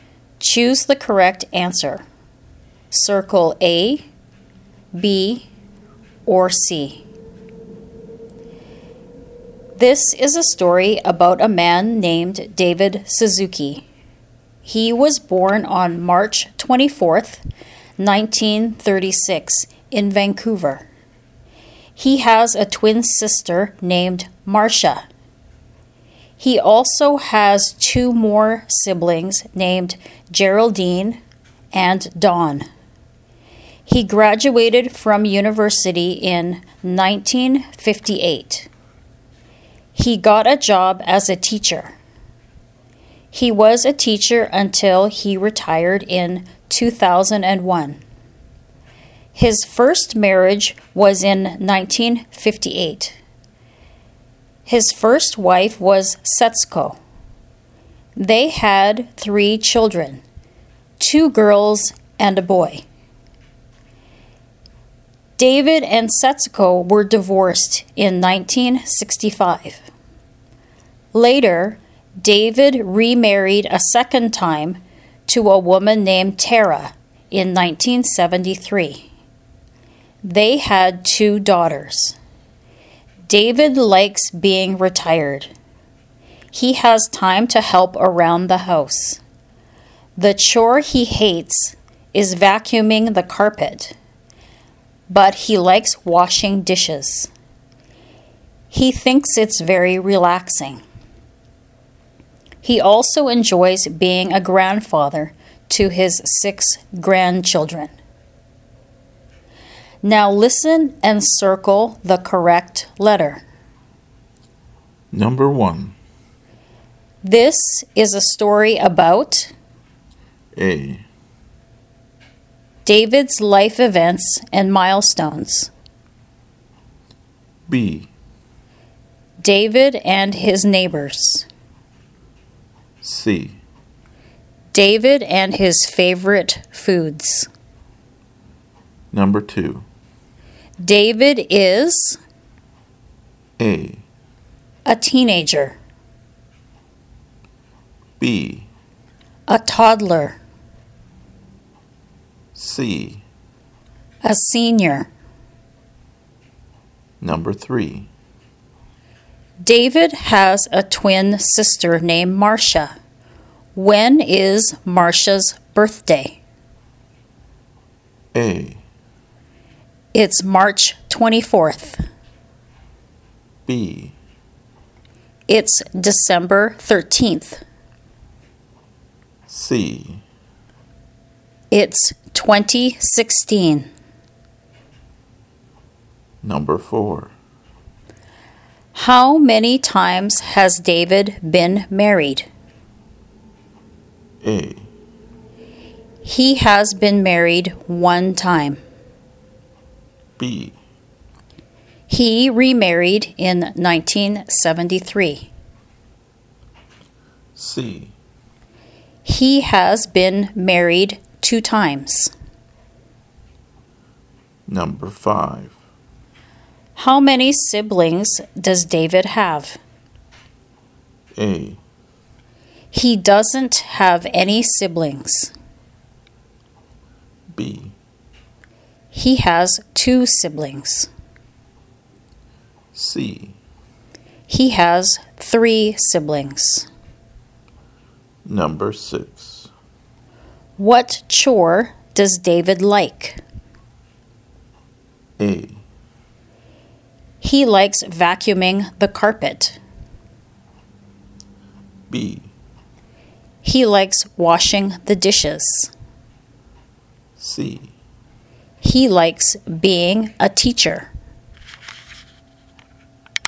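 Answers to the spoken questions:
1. A: David's life events and milestones.
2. C: A senior.
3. A: It's March 24th.
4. C: He has been married 2 times.
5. C: He has 3 siblings.
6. B: He likes washing the dishes.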